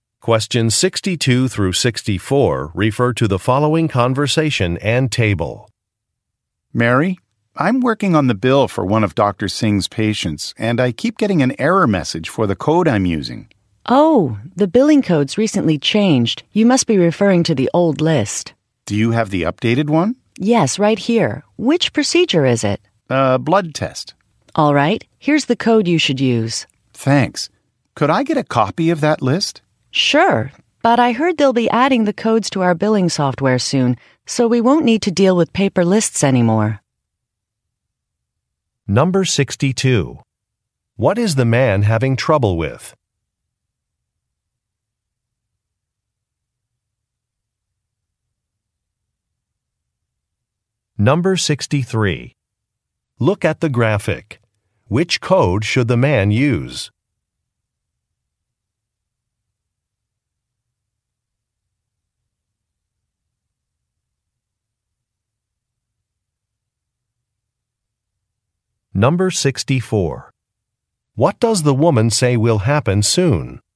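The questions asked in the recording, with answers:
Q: What is the man having trouble with?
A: An error message with the billing code for a patient's bill

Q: What does the woman say will happen soon?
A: The codes will be added to the billing software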